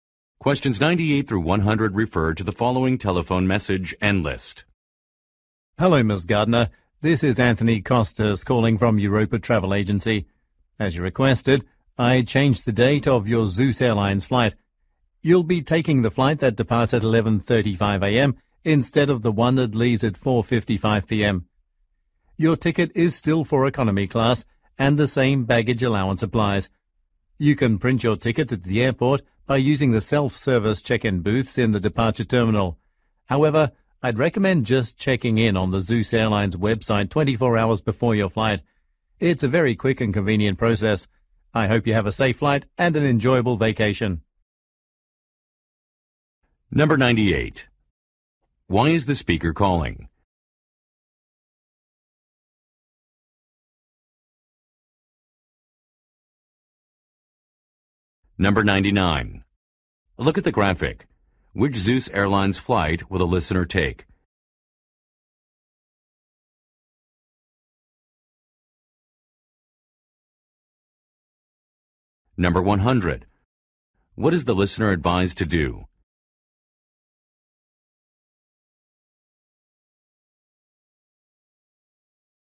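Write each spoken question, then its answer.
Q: Why is the speaker calling?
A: To say that the flight has been changed

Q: What is the listener advised to do?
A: Check in on the Zeus Airlines website 24 hours before the flight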